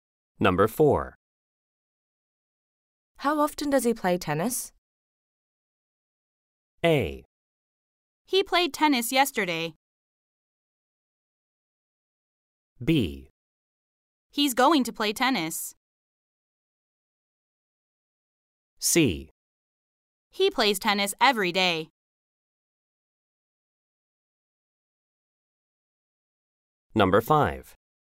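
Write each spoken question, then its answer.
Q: How often does he play tennis?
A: C: He plays tennis every day.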